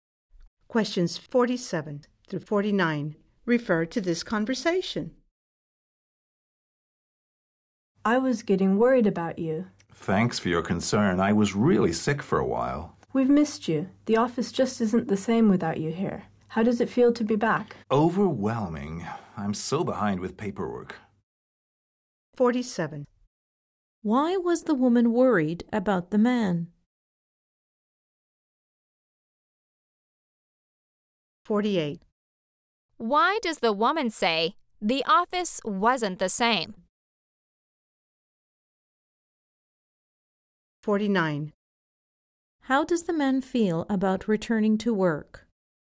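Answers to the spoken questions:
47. He was sick
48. They missed him
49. Overwhelmed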